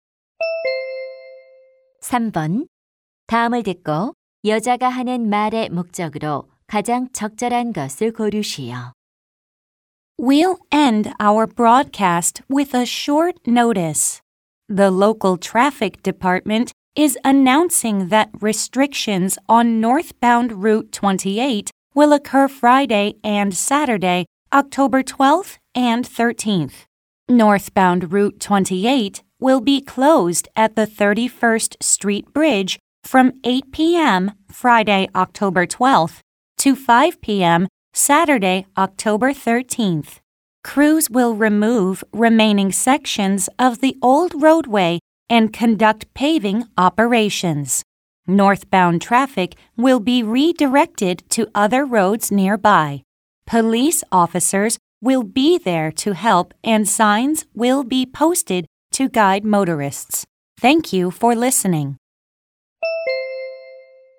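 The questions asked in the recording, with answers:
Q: 다음을 듣고 여자가 하는 말의 목적으로 가장 적절한 것을 고르시오.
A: 28번 도로 북쪽 방향의 통행 제한(폐쇄)을 알리려고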